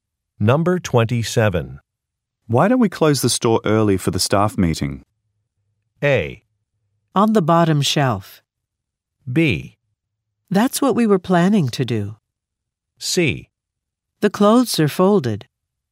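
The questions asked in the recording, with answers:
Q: Why don't we close the store early for the staff meeting?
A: B: That's what we were planning to do.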